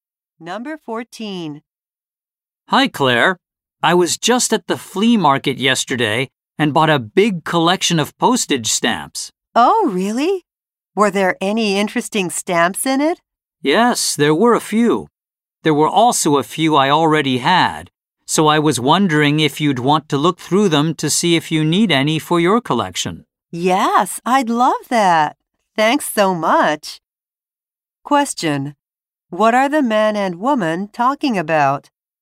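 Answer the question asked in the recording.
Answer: Postage stamps the man bought at a flea market.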